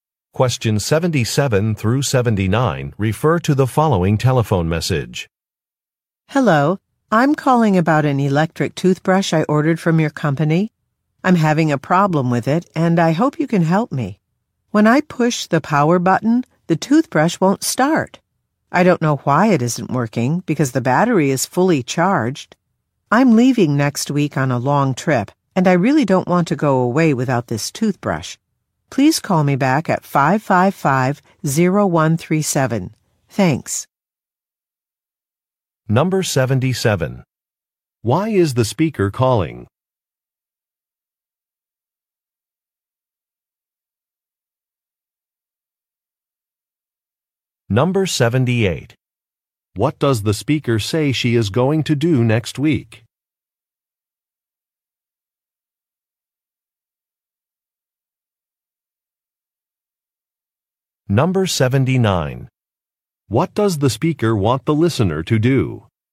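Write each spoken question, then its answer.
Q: Why is the speaker calling?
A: To report a problem with an electric toothbrush she ordered (it won't start)

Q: What does the speaker say she is going to do next week?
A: Go on a long trip

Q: What does the speaker want the listener to do?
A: Call her back at 555-0137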